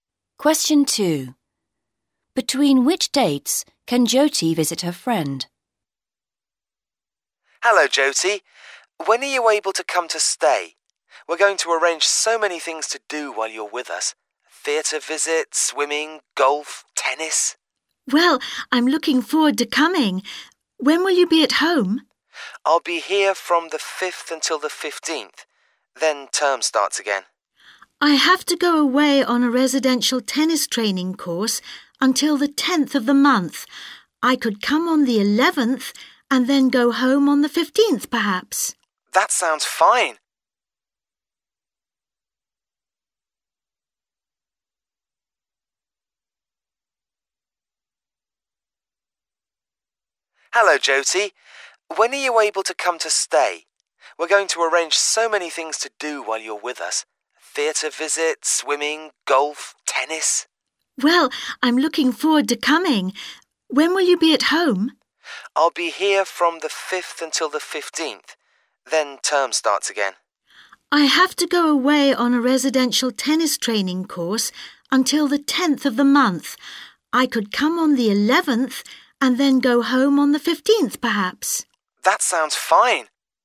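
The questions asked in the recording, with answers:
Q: Between which dates can Jyoti visit her friend?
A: From the 11th to the 15th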